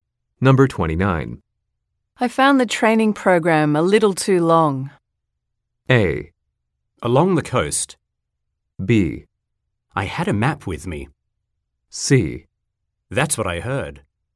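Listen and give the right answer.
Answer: C: That's what I heard.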